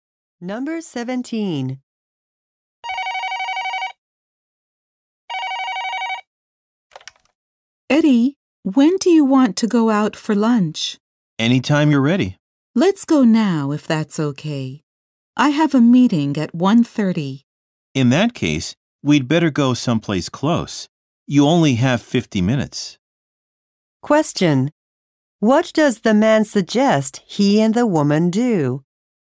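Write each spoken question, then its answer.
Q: What does the man suggest he and the woman do?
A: Go somewhere close for lunch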